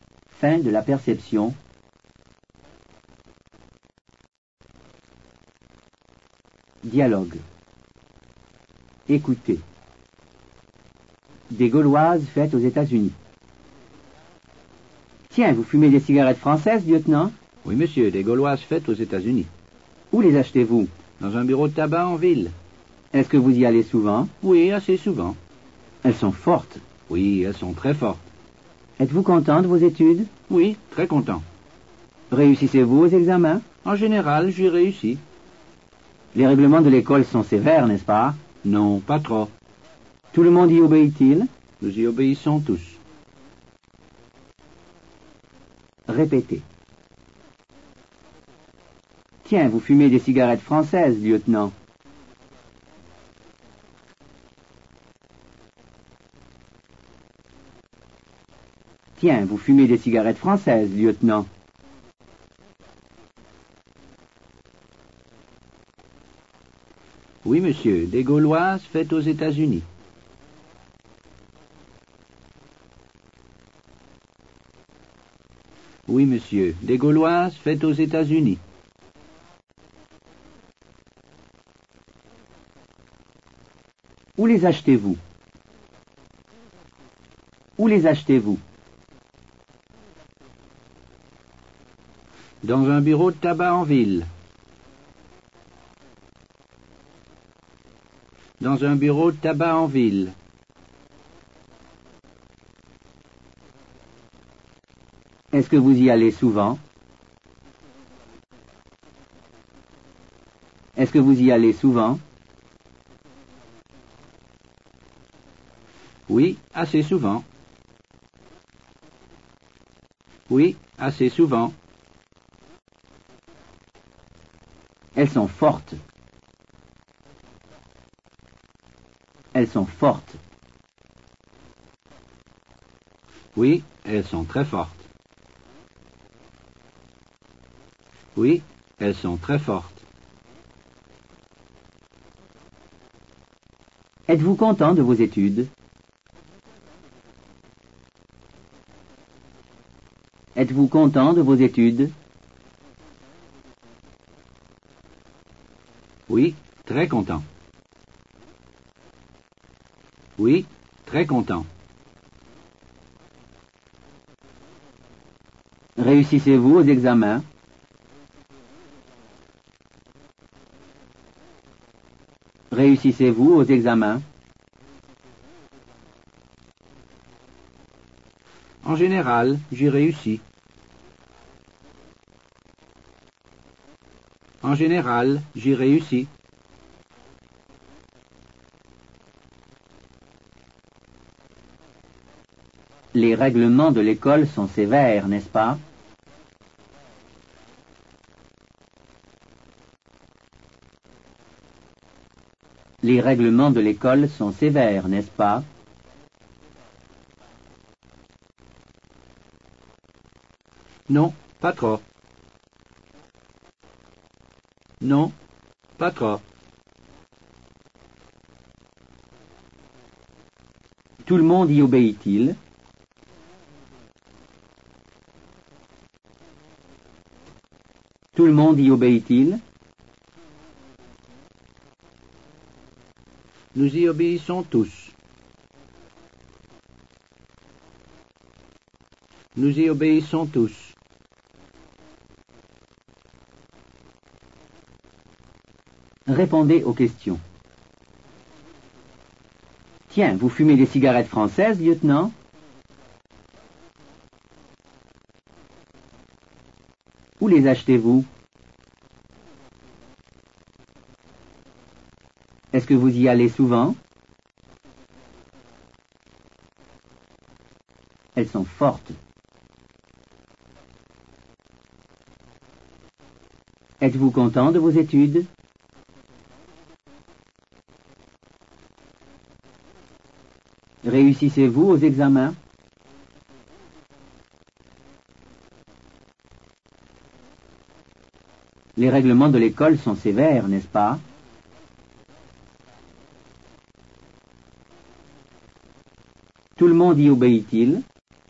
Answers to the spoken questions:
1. Oui, monsieur, des Gauloises faites aux États-Unis.
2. Dans un bureau de tabac en ville.
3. Oui, assez souvent.
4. Oui, elles sont très fortes.
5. Oui, très content.
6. En général, j'ai réussi.
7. Non, pas trop.
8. Nous y obéissons tous.